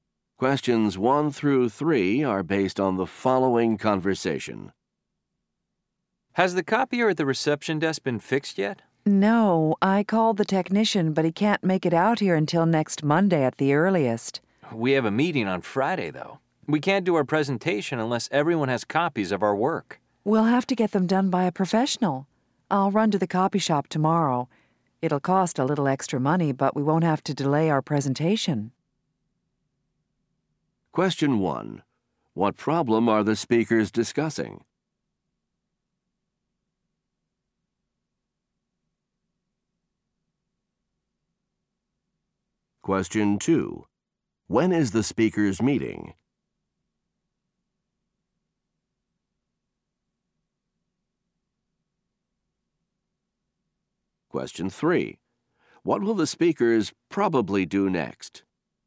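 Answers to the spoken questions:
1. The copier at the reception desk is broken
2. On Friday
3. Get copies made at a copy shop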